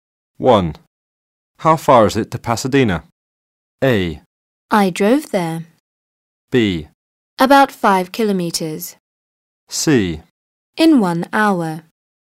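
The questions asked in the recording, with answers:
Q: How far is it to Pasadena?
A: B: About 5 kilometers.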